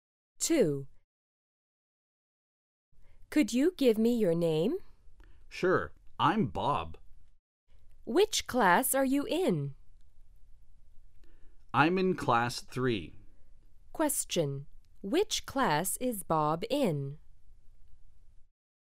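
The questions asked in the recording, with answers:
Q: Which class is Bob in?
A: Class 3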